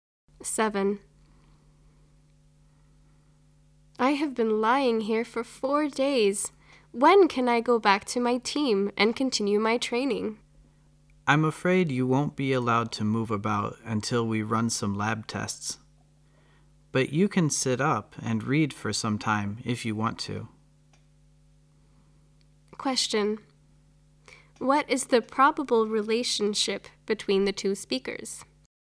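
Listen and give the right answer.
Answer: Doctor and patient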